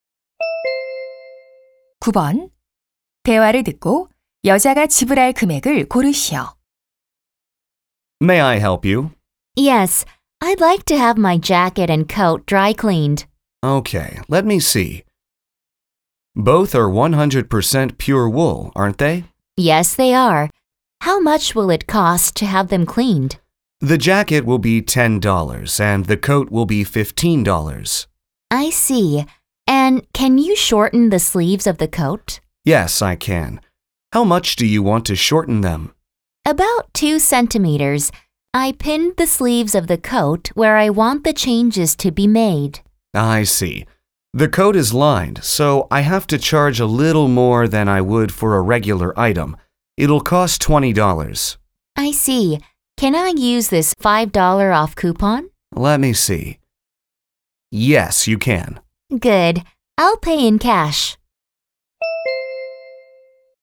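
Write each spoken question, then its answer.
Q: 대화를 듣고 여자가 지불할 금액을 고르시오.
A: $40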